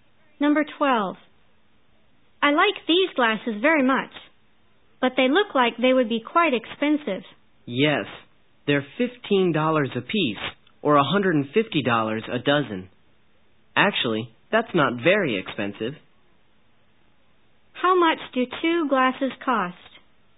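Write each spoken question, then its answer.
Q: How much do 2 glasses cost?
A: $30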